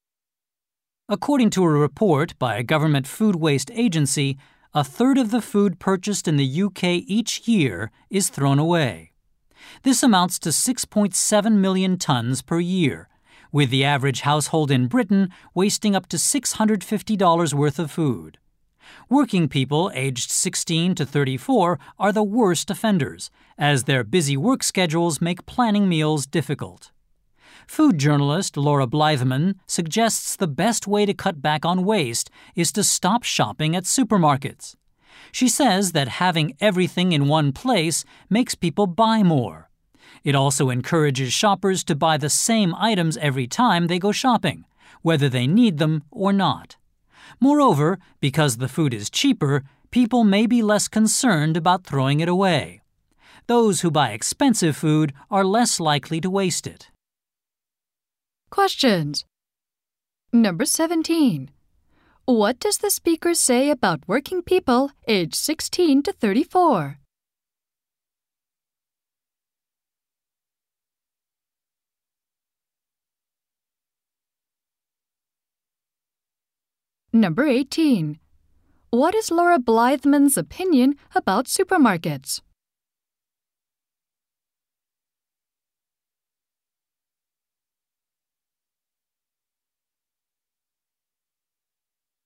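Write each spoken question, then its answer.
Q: What does the speaker say about working people aged 16 to 34?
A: They waste the most food because their busy work schedules make planning meals difficult.

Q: What is Laura Blytheman's opinion about supermarkets?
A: They make people buy more and waste food, so people should stop shopping there.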